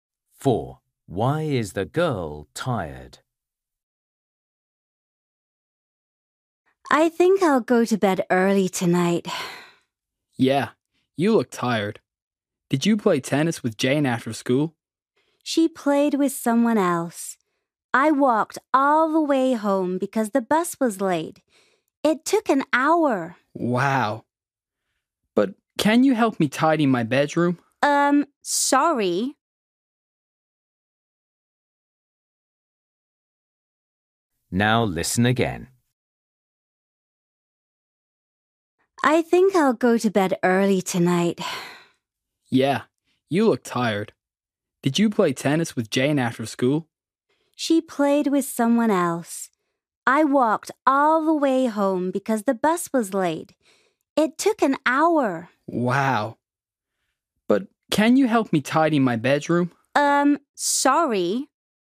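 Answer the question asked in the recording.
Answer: She walked all the way home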